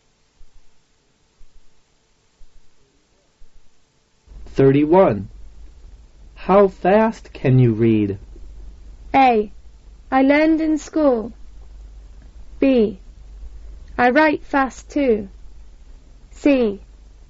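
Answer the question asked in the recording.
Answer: C: Only 90 words a minute.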